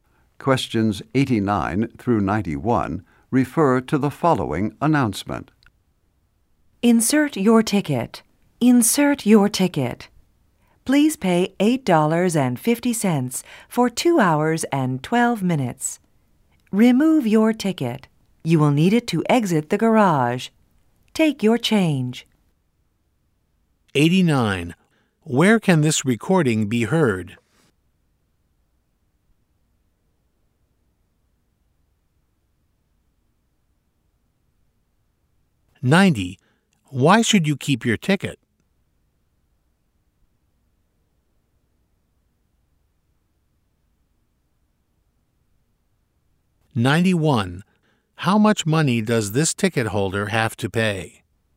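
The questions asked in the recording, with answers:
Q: Where can this recording be heard?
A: In a parking garage

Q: Why should you keep your ticket?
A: To exit the garage

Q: How much money does this ticket holder have to pay?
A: $8.50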